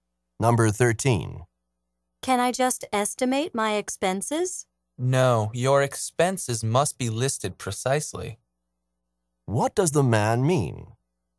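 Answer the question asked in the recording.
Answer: The expenses must be listed exactly, not estimated.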